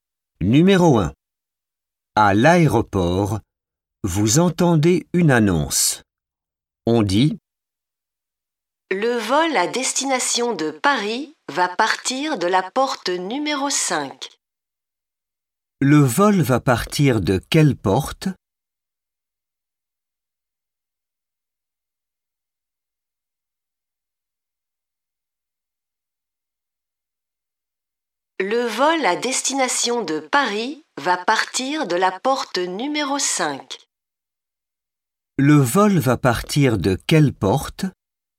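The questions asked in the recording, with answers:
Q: Le vol va partir de quelle porte ?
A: La porte numéro 5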